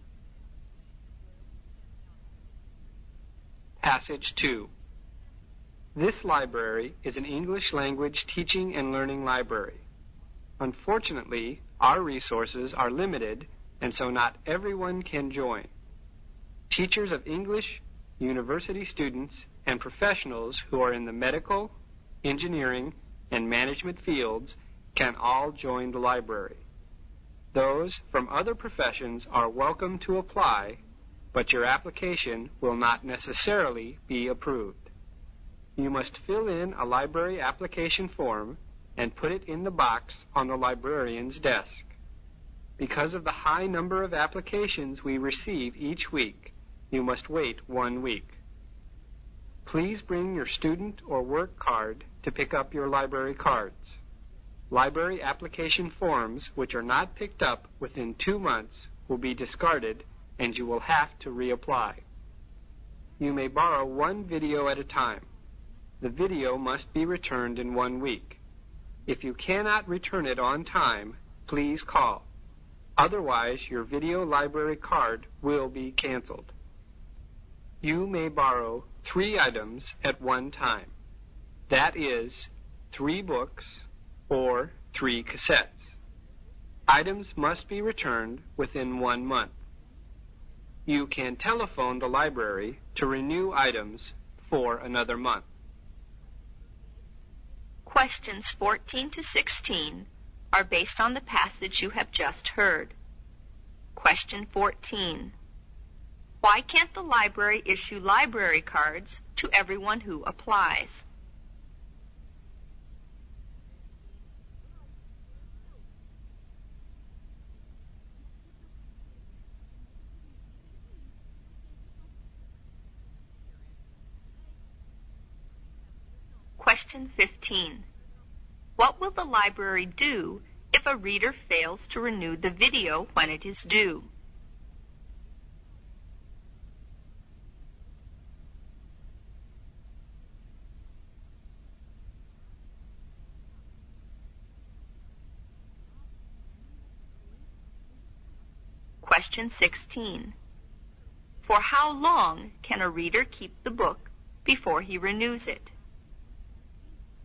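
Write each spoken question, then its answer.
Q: Why can't the library issue library cards to everyone who applies?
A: Its resources are limited

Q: What will the library do if a reader fails to renew the video when it is due?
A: Cancel his video library card

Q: For how long can a reader keep the book before he renews it?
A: One month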